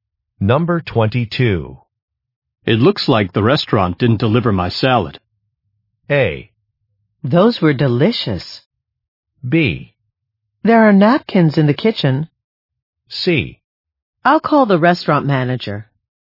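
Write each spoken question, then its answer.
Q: It looks like the restaurant didn't deliver my salad.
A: C: I'll call the restaurant manager.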